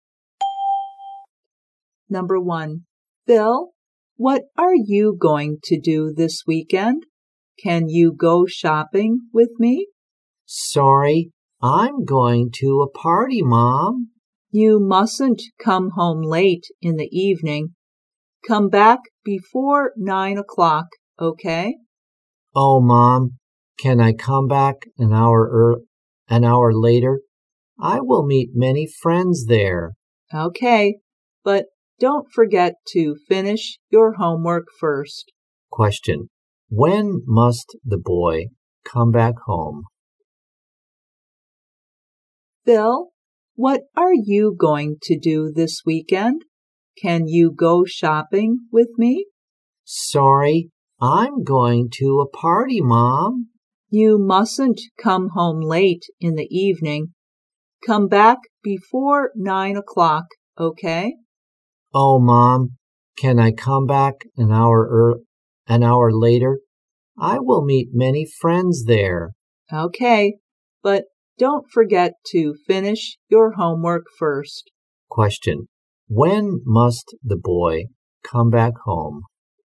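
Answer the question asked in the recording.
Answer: Before 10 o'clock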